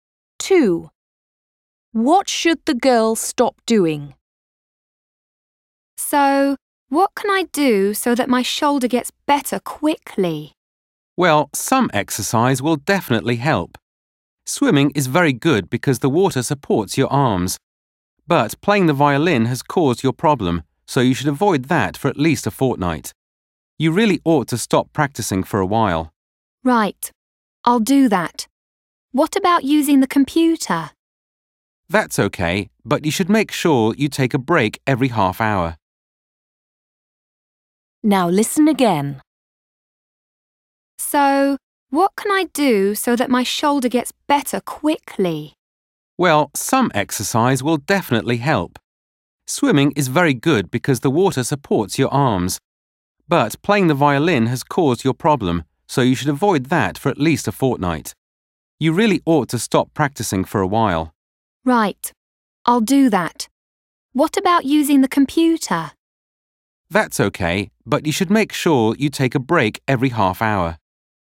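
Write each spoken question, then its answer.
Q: What should the girl stop doing?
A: Playing the violin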